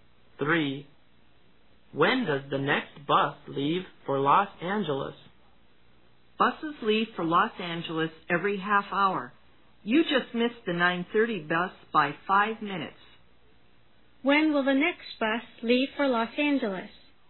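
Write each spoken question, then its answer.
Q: When will the next bus leave for Los Angeles?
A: 10:00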